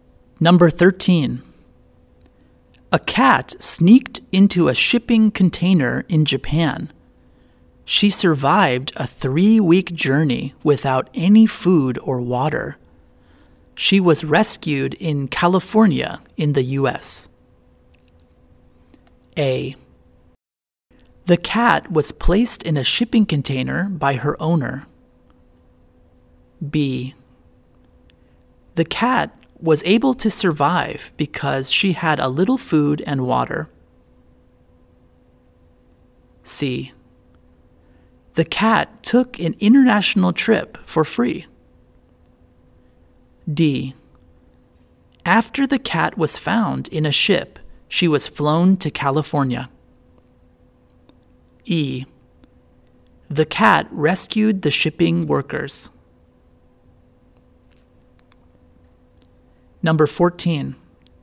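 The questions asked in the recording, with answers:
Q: A cat sneaked into a shipping container in Japan.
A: C: The cat took an international trip for free.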